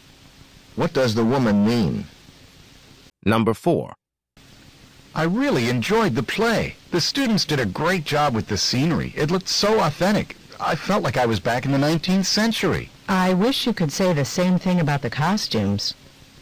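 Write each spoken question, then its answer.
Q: What does the woman imply?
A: The costumes were not as authentic as the scenery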